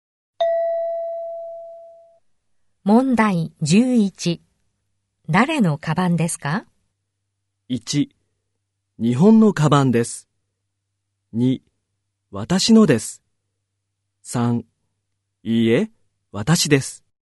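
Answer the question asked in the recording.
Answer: 2: 私のです。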